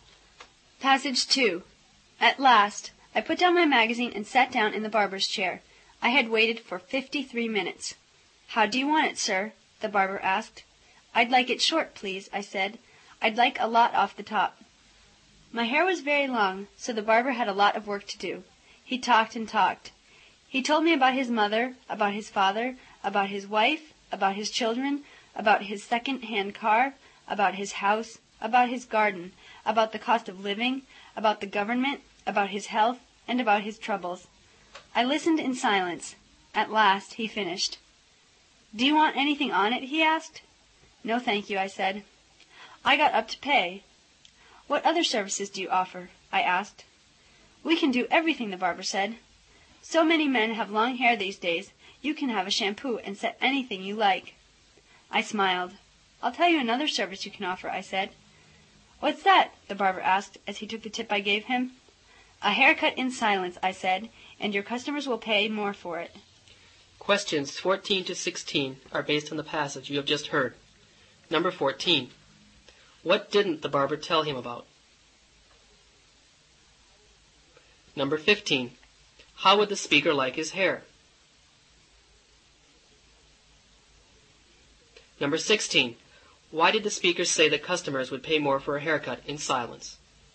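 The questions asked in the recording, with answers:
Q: How would the speaker like his hair?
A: Short, with a lot off the top

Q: Why did the speaker say that customers would pay more for a haircut in silence?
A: Because the barber talked too much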